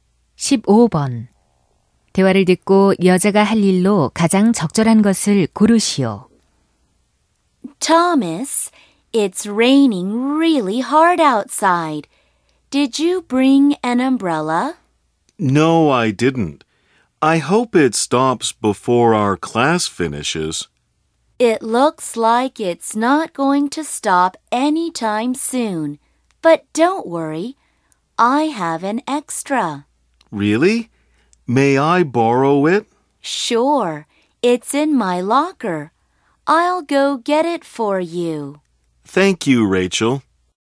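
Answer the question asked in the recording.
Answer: 사물함에서 우산 가져오기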